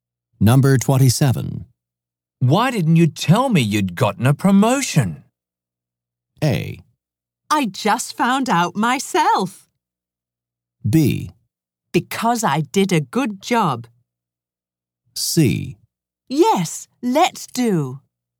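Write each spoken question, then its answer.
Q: Why didn't you tell me you'd gotten a promotion?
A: A: I just found out myself.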